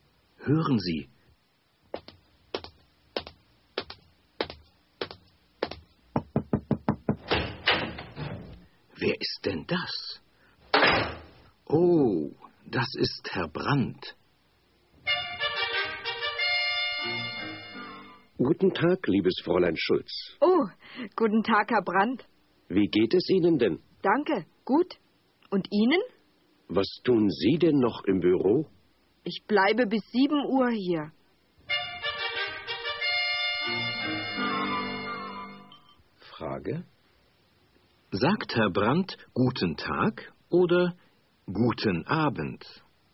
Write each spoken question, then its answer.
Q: Frage: Sagt Herr Brandt guten Tag oder guten Abend?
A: Er sagt guten Tag.